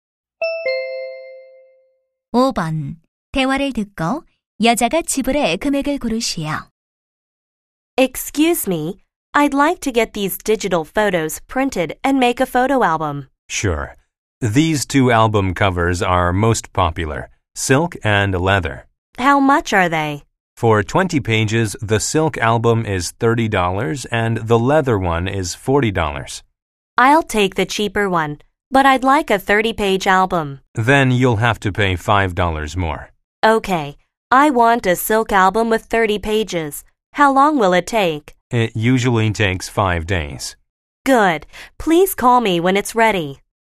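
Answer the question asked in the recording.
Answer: 35달러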